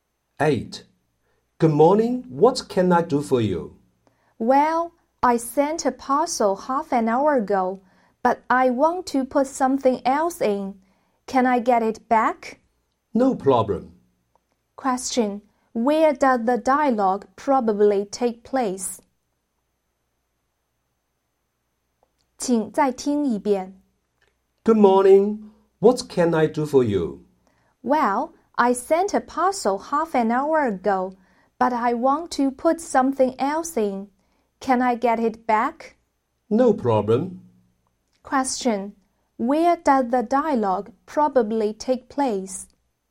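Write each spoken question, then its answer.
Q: Where does the dialogue probably take place?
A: At a post office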